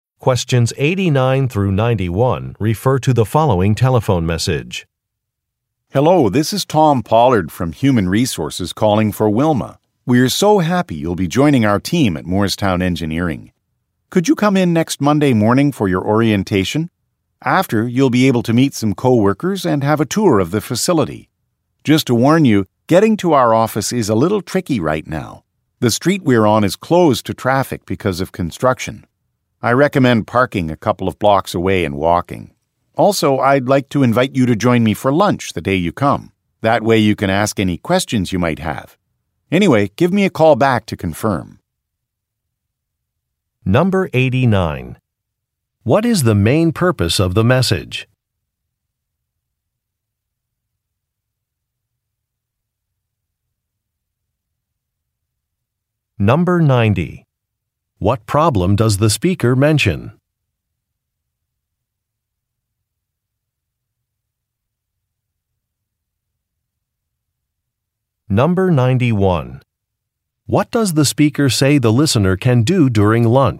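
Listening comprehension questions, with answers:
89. What is the main purpose of the message?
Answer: To schedule an orientation

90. What problem does the speaker mention?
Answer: A road is closed.

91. What does the speaker say the listener can do during lunch?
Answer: Ask questions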